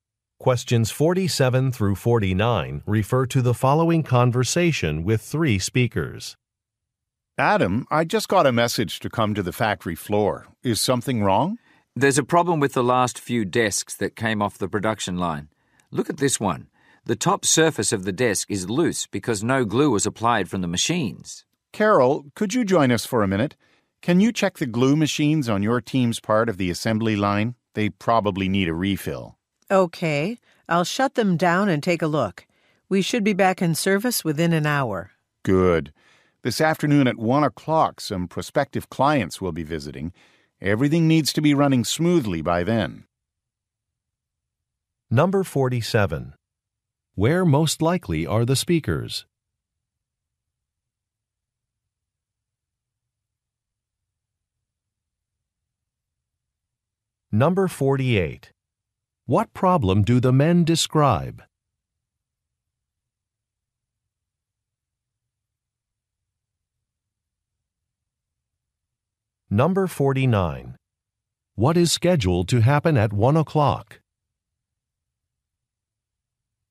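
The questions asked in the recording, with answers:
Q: Where most likely are the speakers?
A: At a furniture factory

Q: What problem do the men describe?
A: Desk tops are loose because no glue was applied

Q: What is scheduled to happen at 1 o'clock?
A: Prospective clients will visit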